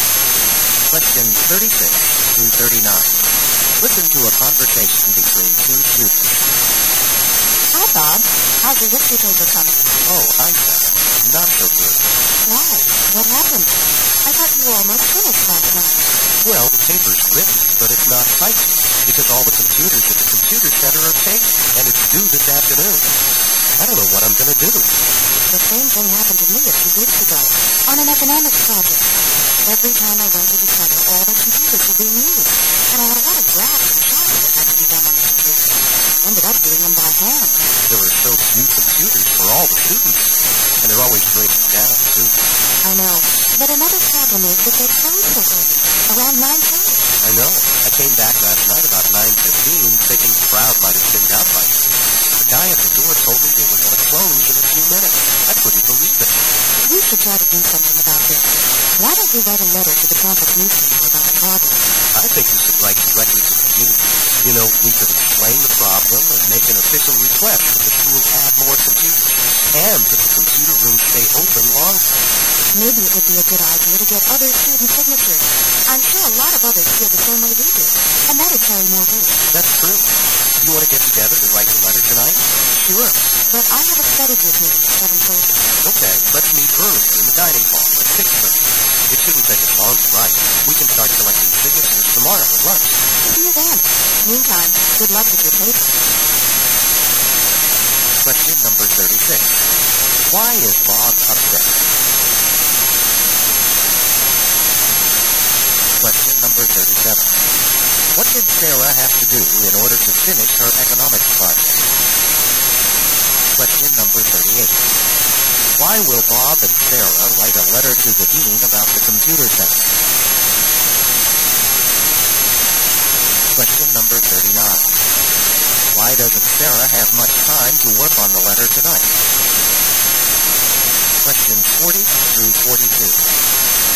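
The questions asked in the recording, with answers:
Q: Why is Bob upset?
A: He can't get a computer to type his paper, which is due this afternoon

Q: What did Sarah have to do in order to finish her economics project?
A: Do her graphs and charts by hand

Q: Why will Bob and Sarah write a letter to the dean about the computer center?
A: There are too few computers and the center closes too early

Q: Why doesn't Sarah have much time to work on the letter tonight?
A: She has a study group meeting at 7:30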